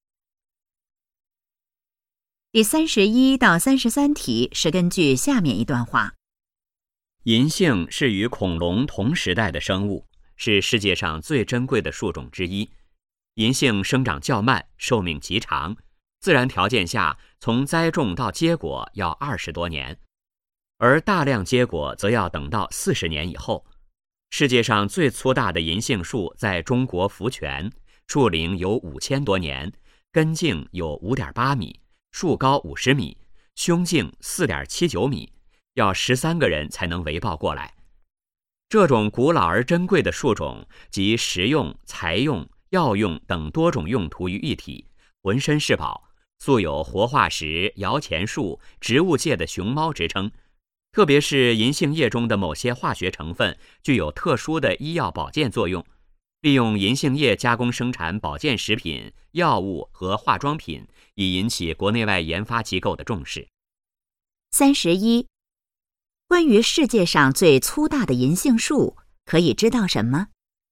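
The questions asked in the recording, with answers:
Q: 关于世界上最粗大的银杏树,可以知道什么?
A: 在中国福泉,树龄5000多年,要13个人才能围抱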